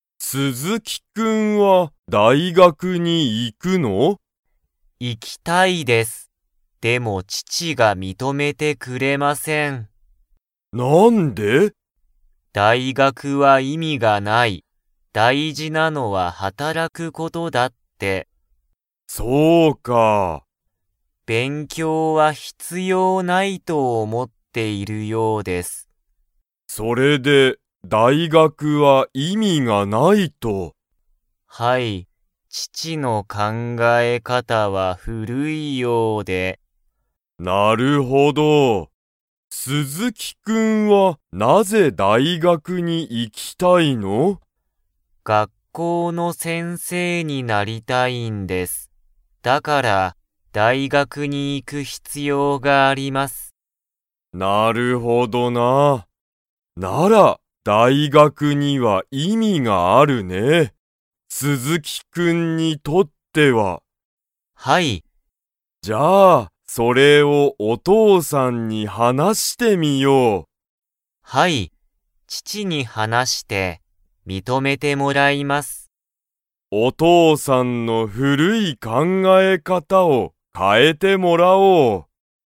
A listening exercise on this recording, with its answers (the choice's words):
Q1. お父とうさんは、何なにが大事だいじだと思おもっていますか?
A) 勉強べんきょうすること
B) 働はたらくこと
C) 遊あそぶこと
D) 認みとめること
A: 働はたらくこと

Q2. 鈴木すずきくんは、お父とうさんと 。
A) 話はなす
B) 話はなさない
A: 話はなす

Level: Level 3